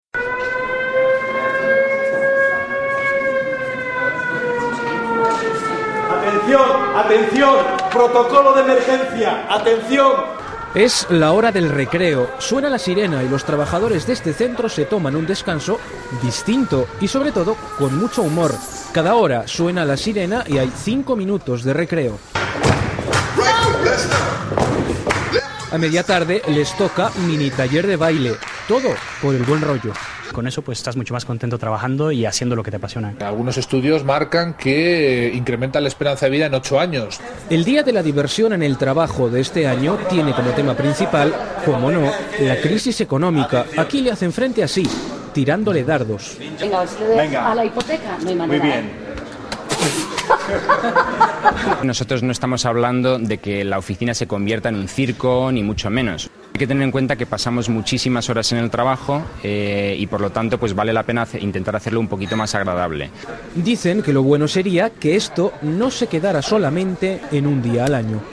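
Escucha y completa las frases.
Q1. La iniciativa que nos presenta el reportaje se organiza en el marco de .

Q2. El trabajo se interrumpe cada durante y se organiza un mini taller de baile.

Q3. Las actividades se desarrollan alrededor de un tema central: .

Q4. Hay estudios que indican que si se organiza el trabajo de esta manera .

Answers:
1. el Día de la Diversión en el Trabajo
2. hora / 5 minutos
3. la crisis económica
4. incrementa la esperanza de vida en 8 años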